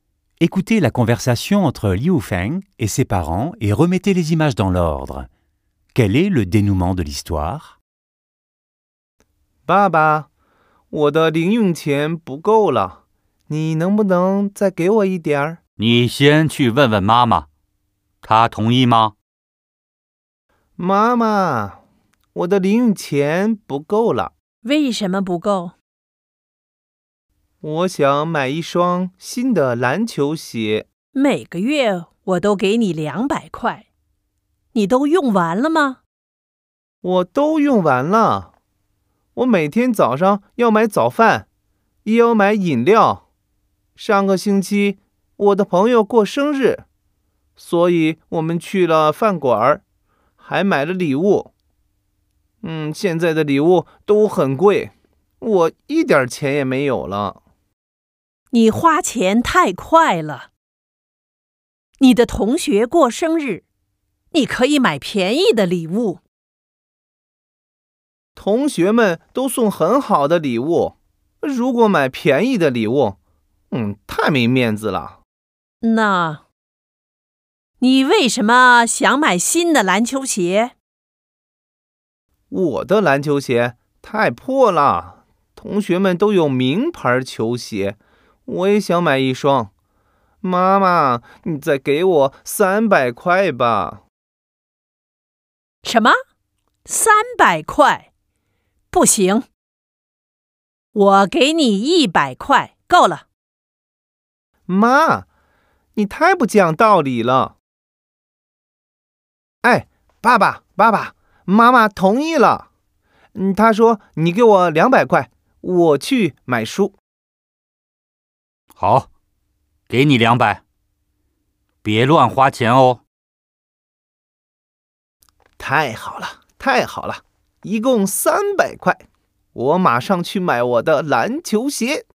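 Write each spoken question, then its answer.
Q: Quel est le dénouement de l'histoire?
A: Liu Feng reçoit 100 kuais de sa mère et, en mentant, 200 de son père : 300 au total, et il va acheter ses chaussures de basket.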